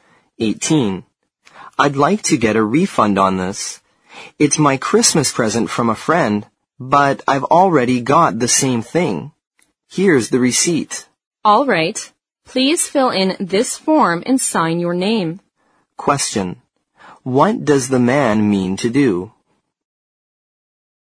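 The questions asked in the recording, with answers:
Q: What does the man mean to do?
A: Get a refund for a Christmas present, because he already has the same thing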